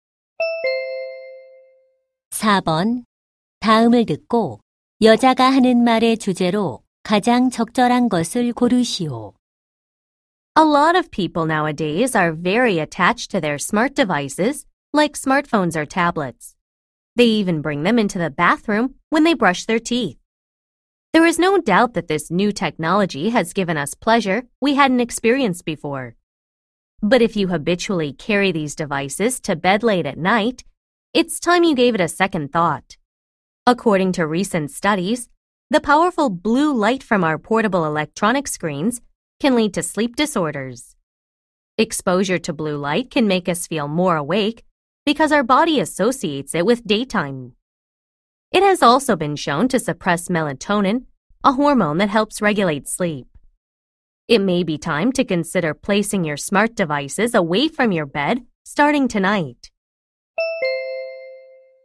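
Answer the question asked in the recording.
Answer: 스마트 기기의 블루라이트가 수면에 미치는 악영향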